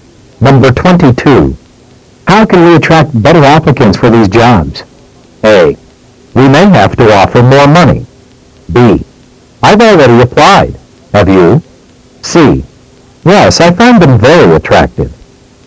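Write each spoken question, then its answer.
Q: How can we attract better applicants for these jobs?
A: A: We may have to offer more money.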